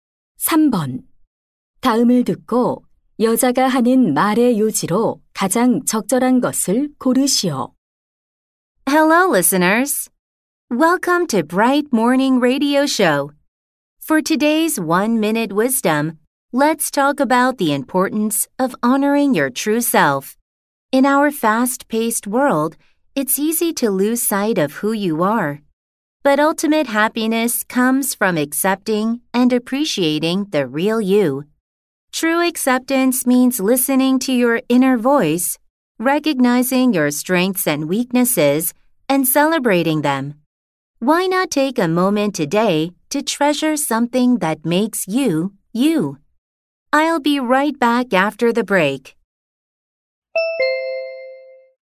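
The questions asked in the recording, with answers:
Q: 다음을 듣고 여자가 하는 말의 요지로 가장 적절한 것을 고르시오.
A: 진정한 자신을 받아들이고 소중히 여기는 것이 행복의 원천이다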